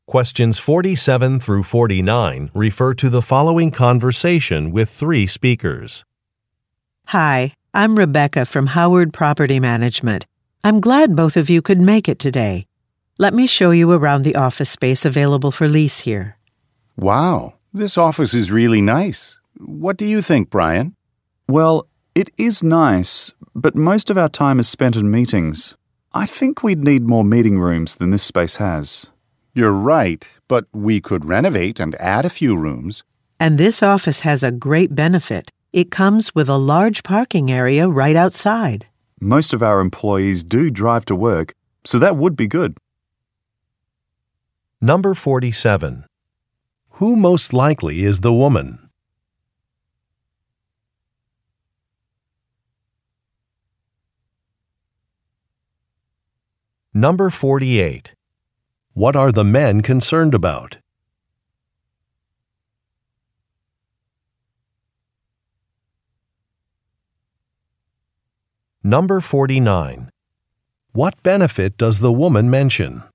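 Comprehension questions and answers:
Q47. Who most likely is the woman?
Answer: A property manager

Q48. What are the men concerned about?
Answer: The number of meeting rooms

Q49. What benefit does the woman mention?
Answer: A parking area is nearby.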